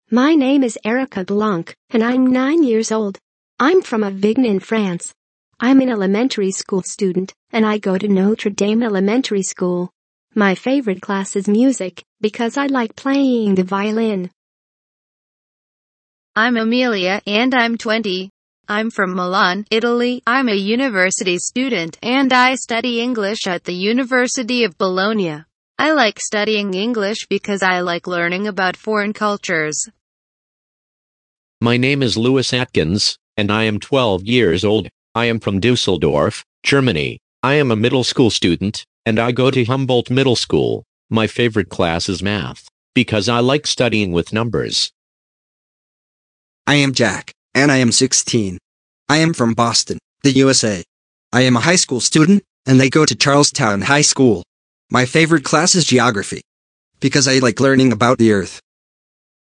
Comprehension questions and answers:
A. Listen to Erica, Emilia, Lewis and Jack and answer the questions (10*2,5 = 25)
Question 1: How old is Erica?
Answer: nine

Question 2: What instrument does Erica play?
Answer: violin

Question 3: Where is Lewis from?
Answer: Dusseldorf, Germany

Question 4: What does Lewis like studying?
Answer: Mathematics

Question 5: How old is Jack?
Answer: sixteen

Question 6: Where is Jack from?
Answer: Boston, the USA

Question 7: What does Emilia study?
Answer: English

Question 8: Lewis goes to Humboldt ___________ School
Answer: middle

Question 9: Jack goes to Charlestown ___________ School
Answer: high

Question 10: Emilia is a student at the ____________ of Bologna.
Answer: university

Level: 10. sınıf